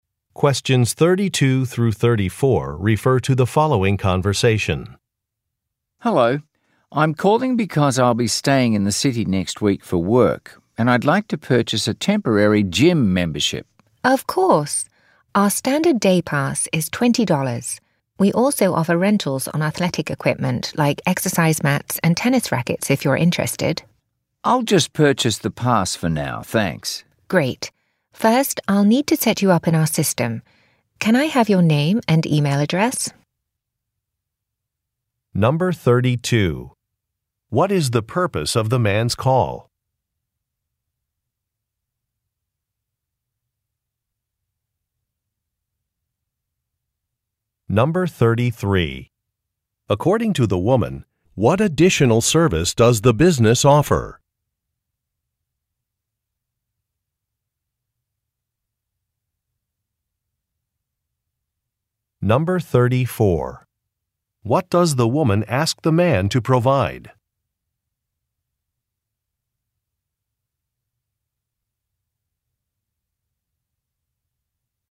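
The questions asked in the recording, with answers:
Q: What is the purpose of the man's call?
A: To buy a temporary gym membership

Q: According to the woman, what additional service does the business offer?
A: Athletic equipment rentals

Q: What does the woman ask the man to provide?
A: His name and email address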